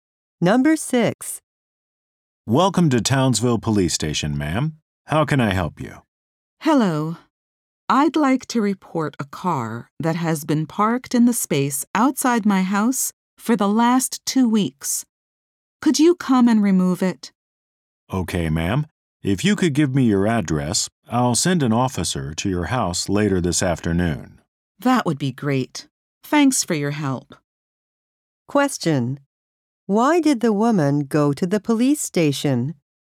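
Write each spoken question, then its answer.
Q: Why did the woman go to the police station?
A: To report a car parked outside her house for two weeks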